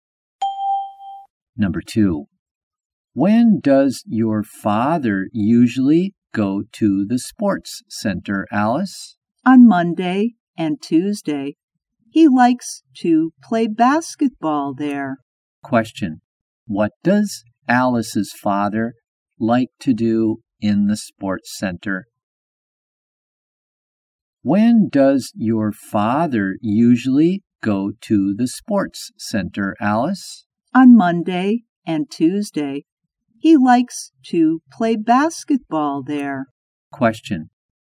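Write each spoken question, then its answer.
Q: Question. What does Alice's father like to do in the sports center?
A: Play basketball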